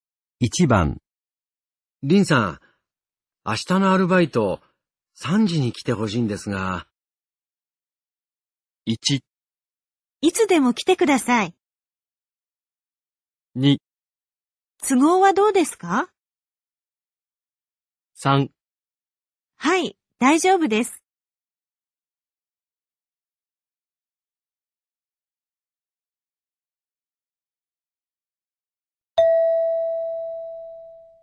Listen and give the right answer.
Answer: 3

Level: N3 Listening · Test 15